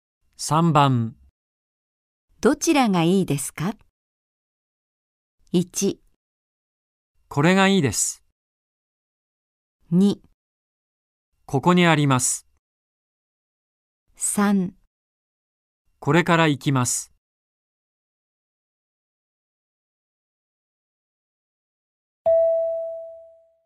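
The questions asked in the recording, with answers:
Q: どちらがいいですか。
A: 1: これがいいです。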